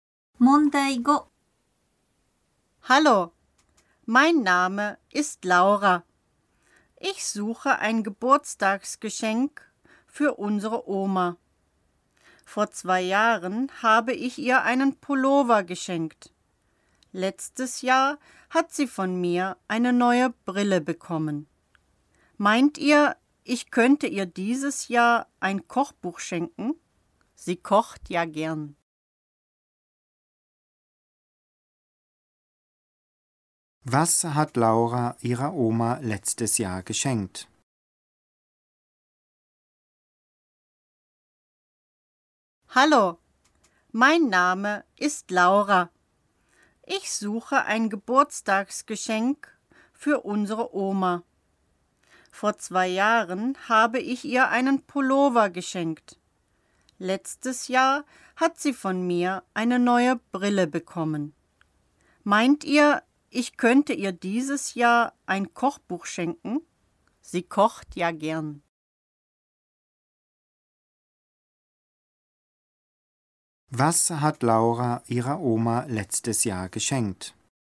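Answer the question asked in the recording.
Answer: Eine neue Brille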